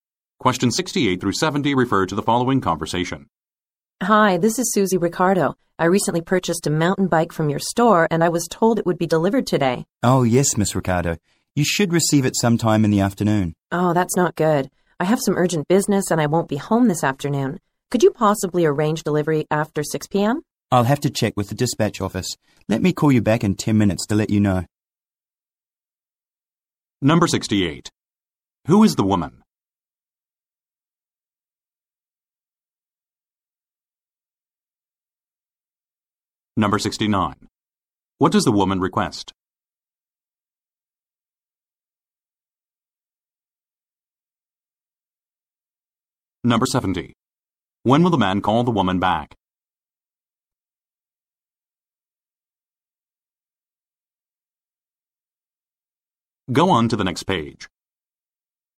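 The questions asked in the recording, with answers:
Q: Who is the woman?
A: A customer who bought a mountain bike

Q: What does the woman request?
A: Delivery after 6 p.m.

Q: When will the man call the woman back?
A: In 10 minutes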